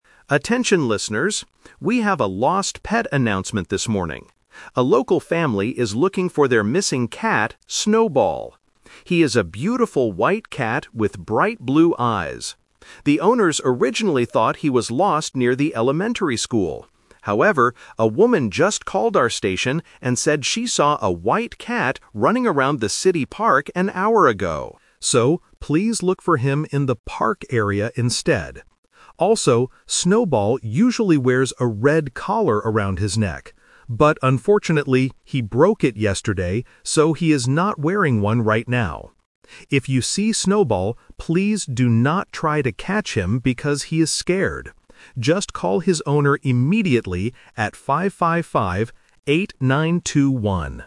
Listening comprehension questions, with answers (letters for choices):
Listen to a radio announcer talking about a lost pet and choose the correct answer (A, B, or C).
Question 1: Where should people look for the lost cat now?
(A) Near the elementary school.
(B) In the City Park.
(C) Inside the radio station.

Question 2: What is the cat wearing around its neck today?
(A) A red collar.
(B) A blue collar.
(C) Nothing.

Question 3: What should you do if you see the cat?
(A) Try to catch him.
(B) Give him some food.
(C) Call the owner's phone number.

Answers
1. B
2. C
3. C

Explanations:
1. The announcer says, "please look for him in the park area instead." Option (A) is the trap; the owners originally thought he was near the school, but someone saw him at the park (The Twist). Option (C) is a distractor.
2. The announcer clearly states that "he is not wearing one right now." Option (A) is the trap; the cat usually wears a red collar, but he broke it yesterday. Option (B) uses the word "blue," which is the color of the cat's eyes, not a collar.
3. The announcer gives the final instruction: "Just call his owner immediately at 555-8921." Option (A) is the trap; the announcer explicitly says, "please do not try to catch him." Option (B) is a good thing to do in real life, but it is not mentioned in the audio.

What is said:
Announcer: Attention listeners. We have a lost pet announcement this morning. A local family is looking for their missing cat, Snowball. He is a beautiful white cat with bright blue eyes. The owners originally thought he was lost near the elementary school. However, a woman just called our station and said she saw a white cat running around the City Park an hour ago. So, please look for him in the park area instead. Also, Snowball usually wears a red collar around his neck. But unfortunately, he broke it yesterday, so he is not wearing one right now. If you see Snowball, please do not try to catch him because he is scared. Just call his owner immediately at 555-8921.

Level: A2